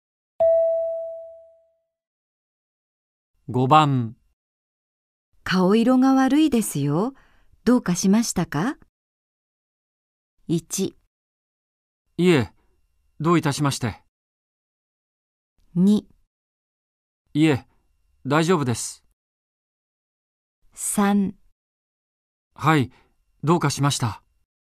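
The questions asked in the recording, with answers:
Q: 顔色が悪いですよ。どうかしましたか?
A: 2: いえ、大丈夫です。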